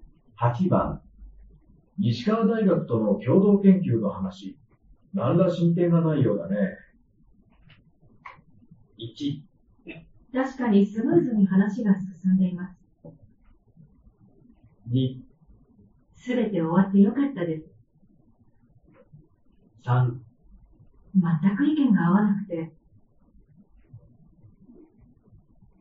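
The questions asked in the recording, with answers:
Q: 西川大学との共同研究の話、何ら進展がないようだね。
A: 3: 全く意見が合わなくて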